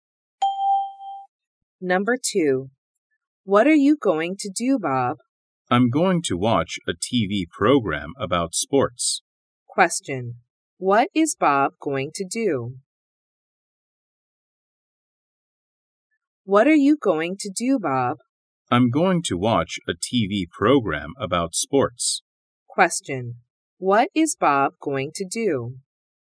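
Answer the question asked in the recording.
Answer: Watch a TV program about sports.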